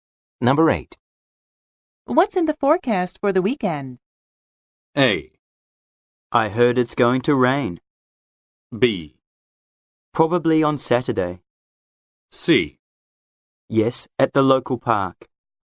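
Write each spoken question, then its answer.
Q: What's in the forecast for the weekend?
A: A: I heard it's going to rain.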